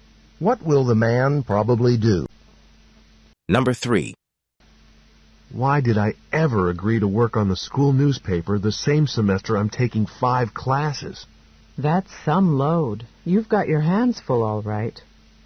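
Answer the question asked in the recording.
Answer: The man has taken on too much work.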